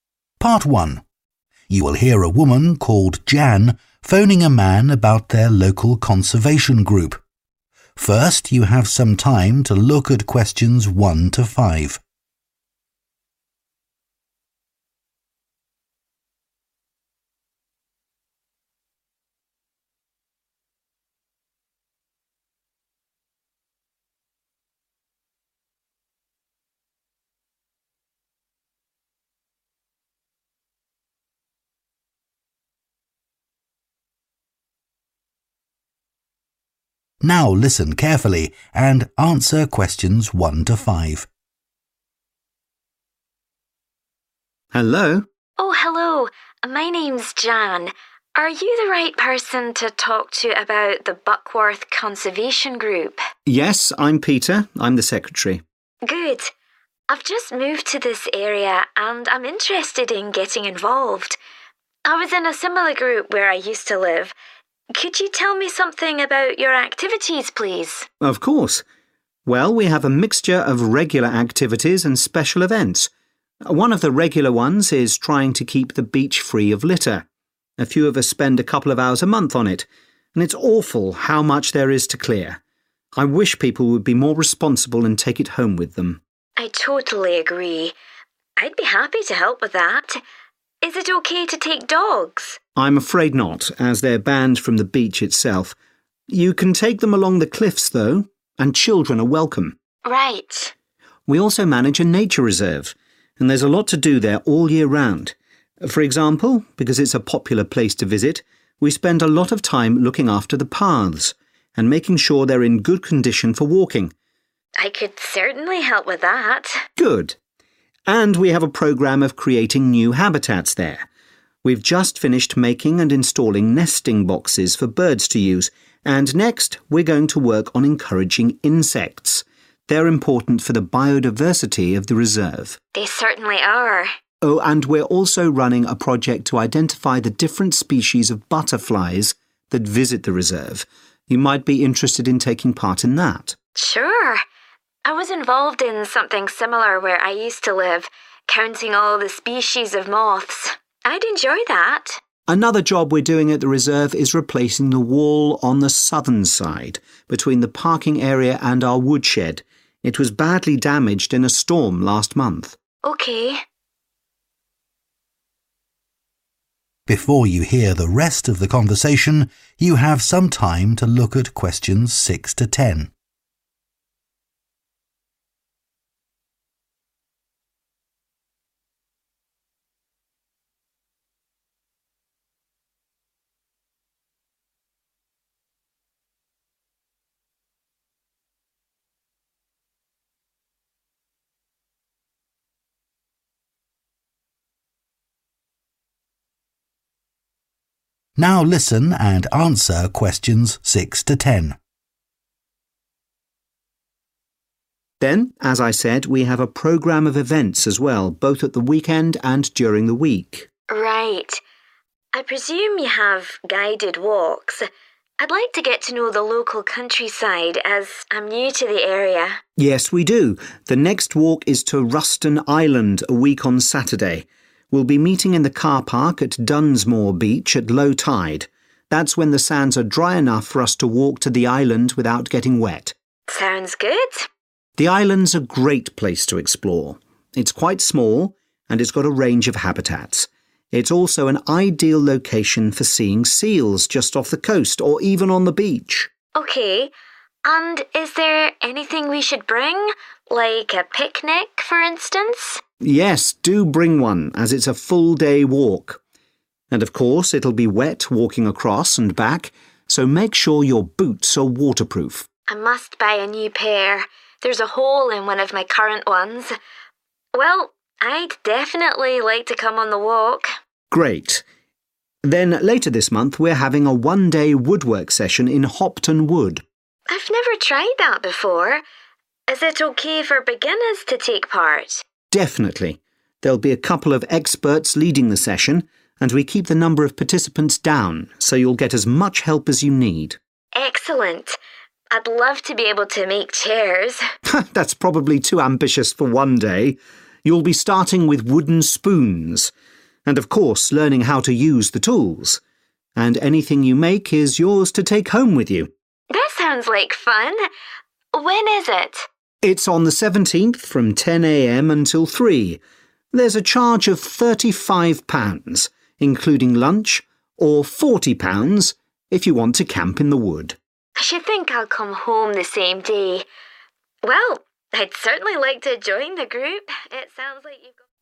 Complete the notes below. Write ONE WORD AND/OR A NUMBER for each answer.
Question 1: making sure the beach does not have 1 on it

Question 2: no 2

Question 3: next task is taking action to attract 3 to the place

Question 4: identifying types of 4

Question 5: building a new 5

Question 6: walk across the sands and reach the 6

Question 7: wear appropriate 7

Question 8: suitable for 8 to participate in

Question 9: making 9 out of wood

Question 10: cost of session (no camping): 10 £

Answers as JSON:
{"1": "litter", "2": "dogs", "3": "insects", "4": "butterflies", "5": "wall", "6": "island", "7": "boots", "8": "beginners", "9": "spoons", "10": "35 / thirty five"}